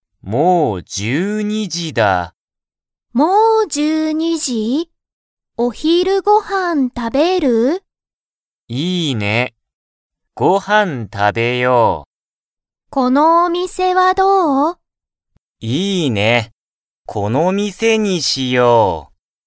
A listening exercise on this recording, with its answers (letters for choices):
Comprehension Quiz (Skip if you don't understand the conversation yet)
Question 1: ゆうたとかおりは、____を食(た)べる。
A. スナック)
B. ご飯(はん)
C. スマホ)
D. お店(みせ)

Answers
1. B